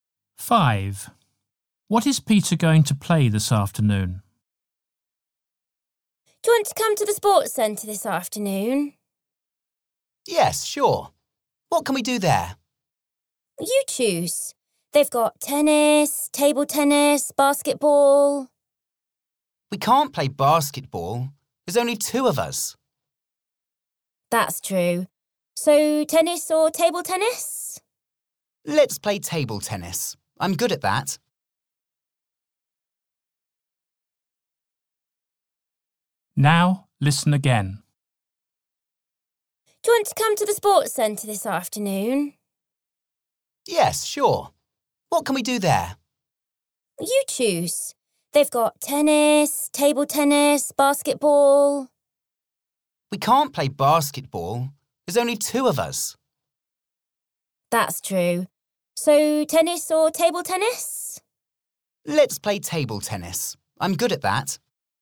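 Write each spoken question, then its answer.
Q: What is Peter going to play this afternoon?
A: Table tennis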